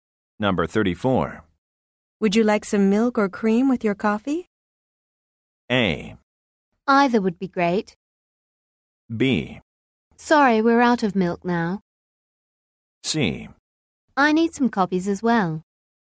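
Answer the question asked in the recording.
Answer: A: Either would be great.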